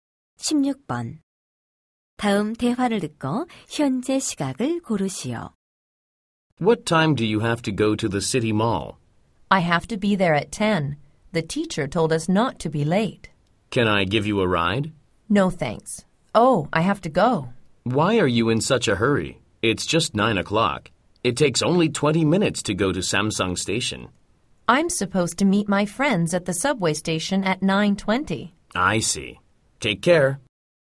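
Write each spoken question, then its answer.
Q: 다음 대화를 듣고 현재 시각을 고르시오.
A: 9시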